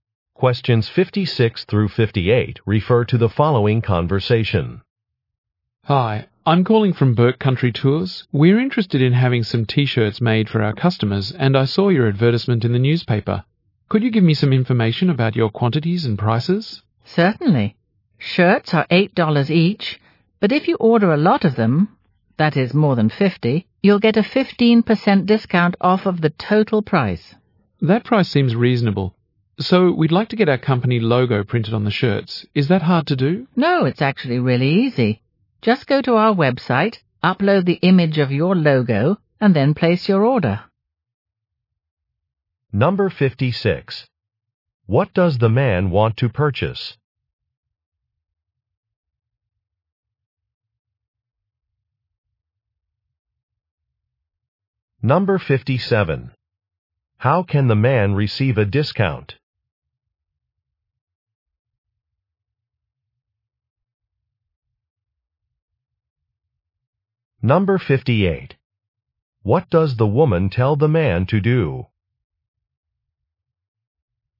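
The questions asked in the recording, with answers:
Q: What does the man want to purchase?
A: T-shirts

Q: How can the man receive a discount?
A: Order more than 50 shirts

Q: What does the woman tell the man to do?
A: Upload the logo on the website and order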